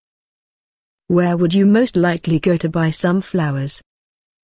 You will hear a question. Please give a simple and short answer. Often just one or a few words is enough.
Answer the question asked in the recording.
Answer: A florist